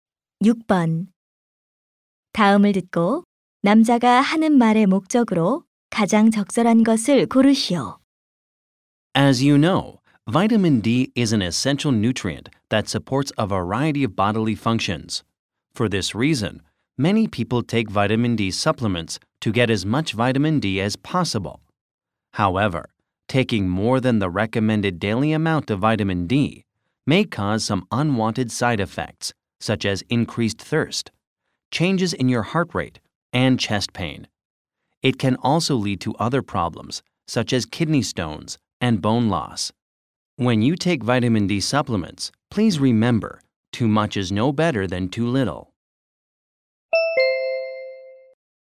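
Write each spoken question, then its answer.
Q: 다음을 듣고 남자가 하는 말의 목적으로 가장 적절한 것을 고르시오.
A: 비타민 D 과다 복용의 위험을 경고하려고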